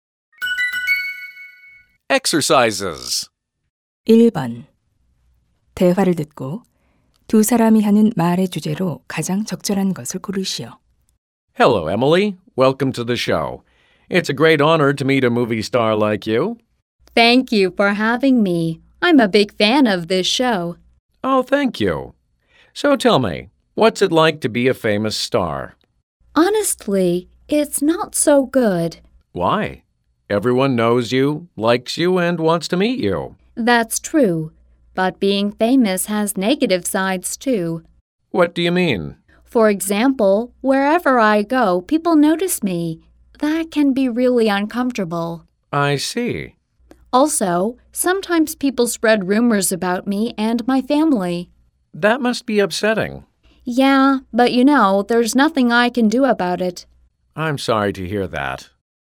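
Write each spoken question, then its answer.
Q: 대화를 듣고 두 사람이 하는 말의 주제로 가장 적절한 것을 고르시오.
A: 유명인이 되는 것의 부정적인 면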